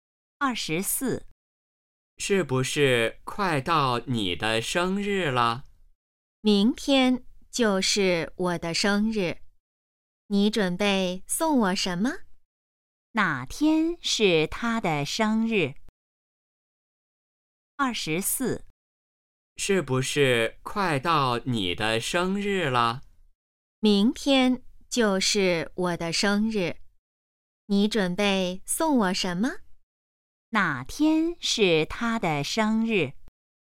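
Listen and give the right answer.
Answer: 明天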